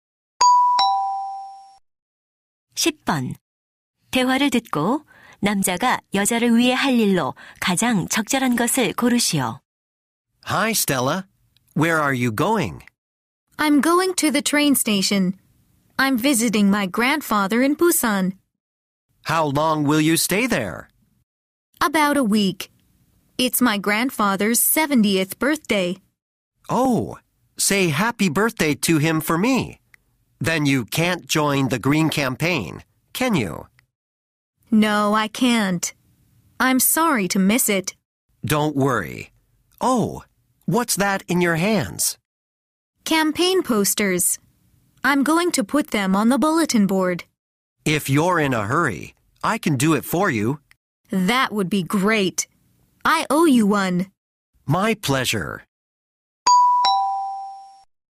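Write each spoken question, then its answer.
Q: 대화를 듣고 남자가 여자를 위해 할 일로 가장 적절한 것을 고르시오.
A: 캠페인 포스터를 게시판에 붙이기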